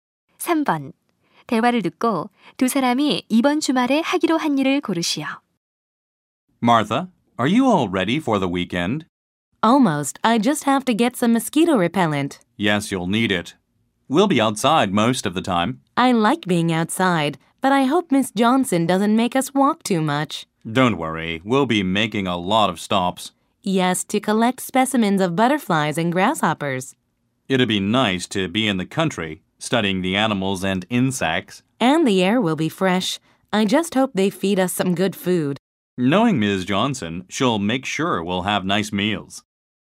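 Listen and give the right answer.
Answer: 시골로 곤충 채집 야외 학습 가기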